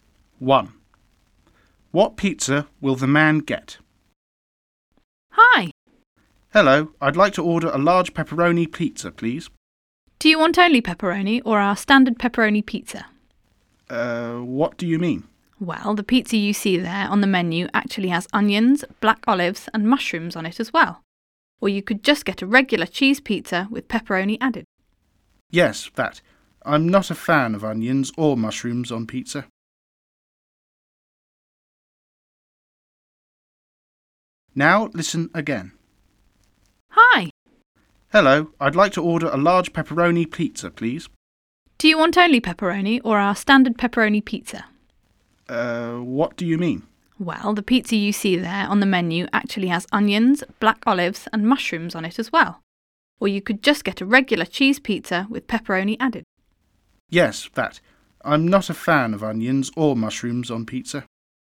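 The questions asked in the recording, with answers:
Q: What pizza will the man get?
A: a regular cheese pizza with pepperoni added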